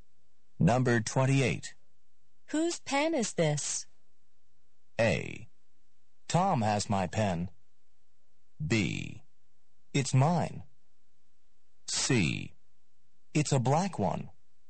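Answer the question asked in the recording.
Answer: B: It's mine.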